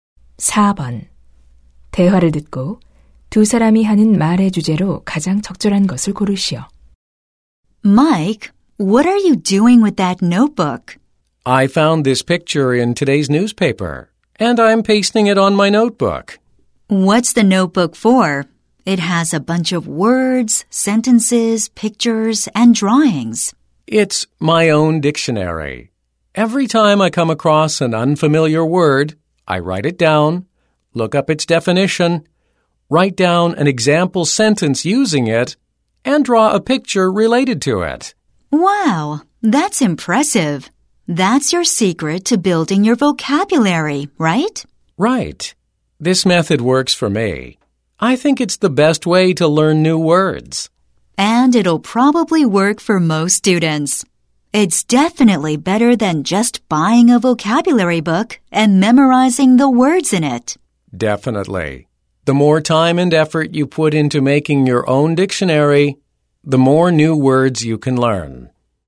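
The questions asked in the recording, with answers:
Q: 대화를 듣고 두 사람이 하는 말의 주제로 가장 적절한 것을 고르시오.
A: 나만의 사전을 만들어 어휘를 익히는 방법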